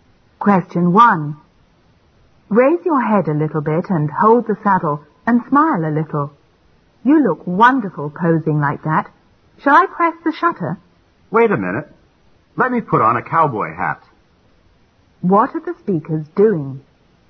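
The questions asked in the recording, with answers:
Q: What are the speakers doing?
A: Taking a photo (the man posing on a horse)

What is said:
W: Raise your head a little bit and hold the saddle and smile a little. You look wonderful posing like that. Shall I press the shutter?
M: Wait a minute. Let me put on the cowboy hat.
Q: What are the speakers doing?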